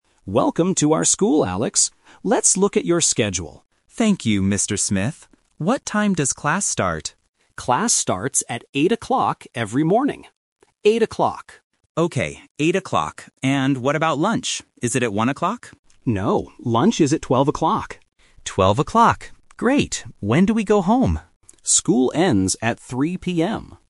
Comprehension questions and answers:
Listen to the conversation and choose the correct answer (A, B, or C).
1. What time does class start?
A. 8:00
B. 9:00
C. 12:00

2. What time is lunch?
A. 12:00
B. 1:00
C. 3:00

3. What time does school end?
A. 1:00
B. 3:00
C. 5:00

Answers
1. A
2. A
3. B

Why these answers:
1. The Key: Mr. Smith says clearly, "Class starts at 8:00 every morning" and repeats "Eight o'clock." The Trap (C): 12:00 is mentioned in the conversation, but it is the time for lunch, not the start of class. (B) is a plausible start time for schools, but it is not mentioned.
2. The Key: Mr. Smith corrects Alex and says, "No, lunch is at 12:00." The Trap (B): 1:00 is mentioned when Alex asks, "Is it at 1:00?", but Mr. Smith says "No". (C) is a trap because 3:00 is the time school ends.
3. The Key: Mr. Smith answers Alex's question by saying, "School ends at 3:00 PM." The Trap (A): 1:00 is mentioned earlier in the audio, but it is the incorrect lunch time. (C) is a plausible time to go home, but it is not mentioned.

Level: A1

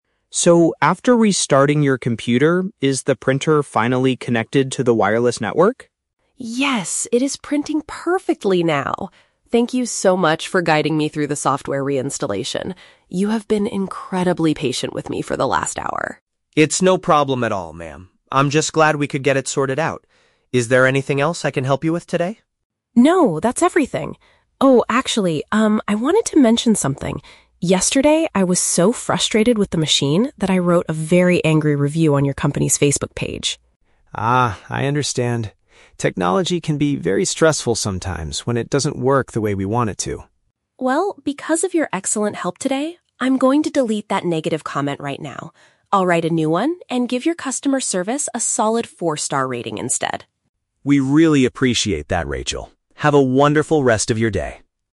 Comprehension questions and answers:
Listen to a phone conversation between a customer and a tech support agent. Choose the correct answer (A, B, or C).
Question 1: What was the customer's main technical problem?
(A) She could not connect her printer.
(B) Her computer screen was completely frozen.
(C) She forgot her social media password.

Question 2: How does the customer describe the tech support agent?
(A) He fixed the issue in just a few minutes.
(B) He was very patient with her.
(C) He was easily frustrated by the technology.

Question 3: What is the customer going to do after the phone call?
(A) Create a new Facebook account.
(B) Buy a better printer from the company.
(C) Change her previous online review.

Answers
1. A
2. B
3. C

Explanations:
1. Daniel asks if the printer is "finally connected to the wireless network," and Rachel confirms it is printing now after reinstalling the software. The Trap: Option (C) is a trap. Facebook is mentioned in the audio, but that is where she wrote the review, not the source of her technical problem. Option (B) is a plausible computer issue but is never mentioned.
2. Rachel explicitly thanks Daniel, saying, "You have been incredibly patient with me." The Trap: Option (A) is a trap of contradiction. The audio actually says he was on the phone with her "for the last hour," so it did not take just a few minutes. Option (C) is a trap because the word "frustrated" is used, but it was Rachel who was frustrated yesterday, not the agent.
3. Rachel promises to "delete that negative comment" and "write a new one" with a four-star rating. Deleting an old comment to write a new one is a paraphrase for changing her previous online review. The Trap: Option (A) is a trap. The audio uses the words "Facebook" and "new", but she is writing a new comment/review, not creating a new account. Option (B) is a common resolution when technology fails, but her printer is working fine now so she doesn't need to buy a new one.

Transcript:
Daniel: So, after restarting your computer, is the printer finally connected to the wireless network?
Rachel: Yes, it is printing perfectly now! Thank you so much for guiding me through the software reinstallation. You have been incredibly patient with me for the last hour.
Daniel: It's no problem at all, ma'am. I'm just glad we could get it sorted out. Is there anything else I can help you with today?
Rachel: No, that's everything. Oh, actually, um, I wanted to mention something. Yesterday, I was so frustrated with the machine that I wrote a very angry review on your company's Facebook page.
Daniel: Ah, I understand. Technology can be very stressful sometimes when it doesn't work the way we want it to.
Rachel: Well, because of your excellent help today, I'm going to delete that negative comment right now. I'll write a new one and give your customer service a solid four-star rating instead.

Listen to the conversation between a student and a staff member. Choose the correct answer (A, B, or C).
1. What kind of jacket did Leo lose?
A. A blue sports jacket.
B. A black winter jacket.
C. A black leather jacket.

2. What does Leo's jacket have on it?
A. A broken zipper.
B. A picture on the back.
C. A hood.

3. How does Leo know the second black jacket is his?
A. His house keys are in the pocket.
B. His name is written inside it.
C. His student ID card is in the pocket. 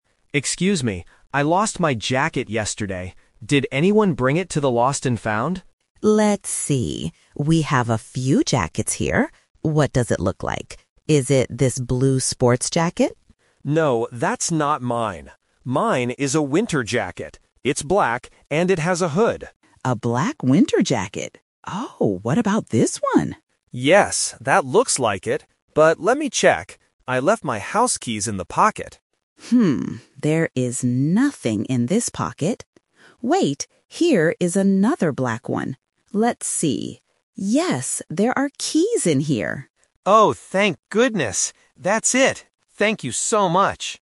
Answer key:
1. B
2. C
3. A

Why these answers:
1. Leo clearly describes his item: "Mine is a winter jacket. It's black..." Option (A) is the trap; Mrs. Higgins asks if the blue sports jacket is his, but he says "No." Option (C) is a plausible type of clothing but is not mentioned in the audio.
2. When describing the jacket, Leo says, "It's black, and it has a hood." Options (A) and (B) are plausible details for a jacket, but they are not mentioned in the conversation.
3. This question uses the "Twist" technique. Mrs. Higgins finds a black jacket first, but it is empty. Then she finds a second one and says, "yes, there are keys in here!" Leo confirms it is his. Options (B) and (C) are common ways to identify lost items, but they are not mentioned.

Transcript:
Leo: Excuse me, I lost my jacket yesterday. Did anyone bring it to the Lost and Found?
Higgins: Let's see. We have a few jackets here. What does it look like? Is it this blue sports jacket?
Leo: No, that's not mine. Mine is a winter jacket. It's black, and it has a hood.
Mrs. Higgins: A black winter jacket... Oh, what about this one?
Leo: Yes, that looks like it! But let me check. I left my house keys in the pocket.
Higgins: Hmm, there is nothing in this pocket. Wait, here is another black one. Let's see... yes, there are keys in here!

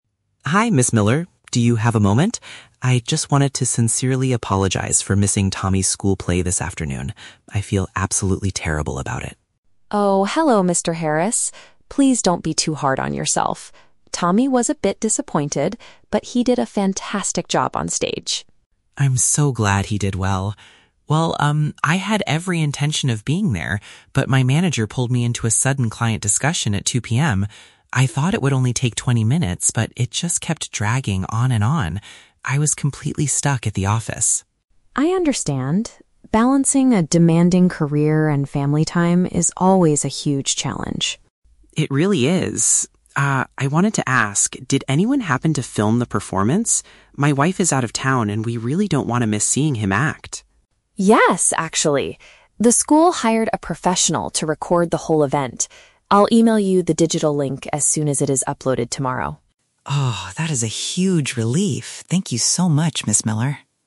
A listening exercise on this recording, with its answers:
Listen to the conversation between a parent (Mr. Harris) and a teacher (Ms. Miller), and choose the correct answer (A, B, or C).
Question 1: Why did Mr. Harris miss his son's performance?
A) He had to travel out of town for a company business trip.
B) He was delayed by an unexpectedly long meeting at work.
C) He forgot the exact starting time of the afternoon event.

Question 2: How does Mr. Harris feel at the beginning of the conversation?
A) He feels extremely guilty about being absent.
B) He feels angry because his manager gave him too much work.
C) He feels disappointed in his son's acting skills.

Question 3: What does Ms. Miller promise to do for Mr. Harris?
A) Ask another parent to share their personal recording.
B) Allow Tommy to perform the play one more time for him.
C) Send him an online video of the school show.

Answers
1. B
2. A
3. C

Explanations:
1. Mr. Harris says he was pulled into a "sudden client discussion" that "kept dragging on and on," leaving him "stuck at the office." "Unexpectedly long meeting" is a direct paraphrase of this situation.
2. Mr. Harris says, "I just wanted to sincerely apologize" and "I feel absolutely terrible about it." These phrases show that he is experiencing deep guilt about his absence.
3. Ms. Miller says the school hired a professional to record the event and she will "email you the digital link." Sending an "online video" is a paraphrase of emailing a digital link.

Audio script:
Miller. Do you have a moment? I just wanted to sincerely apologize for missing Tommy's school play this afternoon. I feel absolutely terrible about it.
Miller: Oh, hello Mr. Harris. Please don't be too hard on yourself. Tommy was a bit disappointed, but he did a fantastic job on stage.
Mr. Harris: I'm so glad he did well. Well, um, I had every intention of being there, but my manager pulled me into a sudden client discussion at 2:00 PM. I thought it would only take twenty minutes, but it just kept dragging on and on. I was completely stuck at the office.
Miller: I understand. Balancing a demanding career and family time is always a huge challenge.
Mr. Harris: It really is. Ah, I wanted to ask... did anyone happen to film the performance? My wife is out of town, and we really don't want to miss seeing him act.
Miller: Yes, actually! The school hired a professional to record the whole event. I'll email you the digital link as soon as it is uploaded tomorrow.

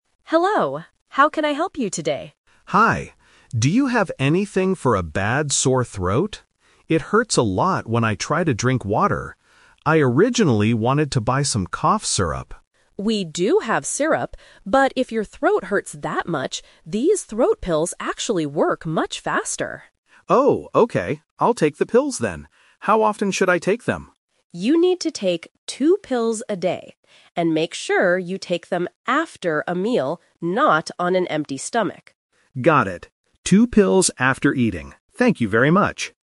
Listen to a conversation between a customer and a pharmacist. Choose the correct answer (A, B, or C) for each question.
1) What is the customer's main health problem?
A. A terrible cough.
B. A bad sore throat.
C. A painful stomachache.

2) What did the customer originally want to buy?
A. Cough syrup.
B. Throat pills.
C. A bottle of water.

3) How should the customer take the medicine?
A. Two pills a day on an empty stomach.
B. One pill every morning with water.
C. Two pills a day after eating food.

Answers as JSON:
{"1": "B", "2": "A", "3": "C"}

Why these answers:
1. The customer clearly asks, "Do you have anything for a bad sore throat?" The Trap: Option A is a trap. The customer mentions "cough syrup," but does not say they have a cough. Option C is a trap because the pharmacist mentions an "empty stomach," but the customer does not have a stomachache.
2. The customer says, "I originally wanted to buy some cough syrup." This was his first plan. The Trap: Option B is the A2 "Twist" trap. He decides to buy the throat pills at the end, but it was not what he originally wanted. Option C is incorrect; he says it hurts to drink water, but he doesn't want to buy it.
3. The pharmacist says to take "two pills a day" and "take them after a meal." A meal means eating food. The Trap: Option A is the exact opposite of the pharmacist's instructions ("not on an empty stomach"). Option B is a plausible instruction for medicine in real life, but it is never mentioned in the audio.

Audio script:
Pharmacist: Hello. How can I help you today?
Customer: Hi. Do you have anything for a bad sore throat? It hurts a lot when I try to drink water. I originally wanted to buy some cough syrup.
Pharmacist: We do have syrup, but if your throat hurts that much, these throat pills actually work much faster.
Customer: Oh, okay. I'll take the pills then. How often should I take them?
Pharmacist: You need to take two pills a day. And make sure you take them after a meal, not on an empty stomach.

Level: A2

